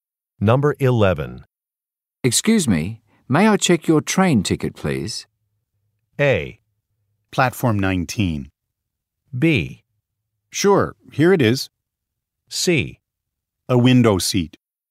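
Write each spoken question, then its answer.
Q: Excuse me, may I check your train ticket, please?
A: B: Sure, here it is.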